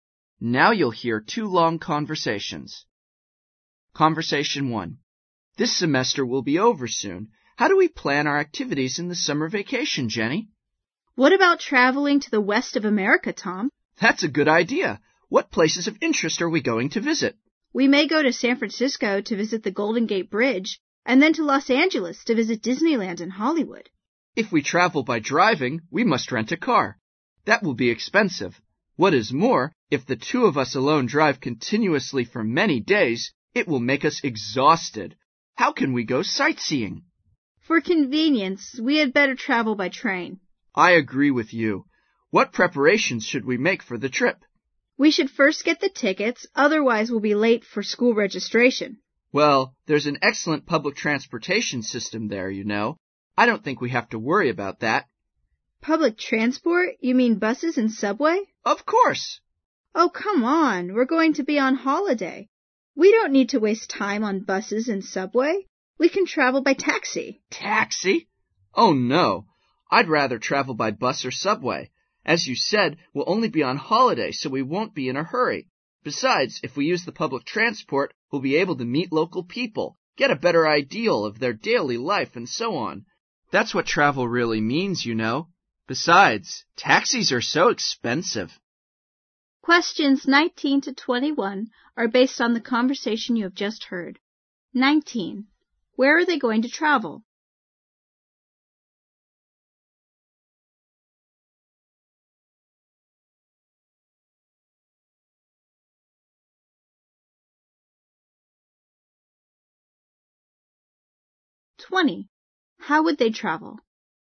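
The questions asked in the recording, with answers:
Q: Where are they going to travel?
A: The west of America (San Francisco and Los Angeles)

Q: How would they travel?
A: By train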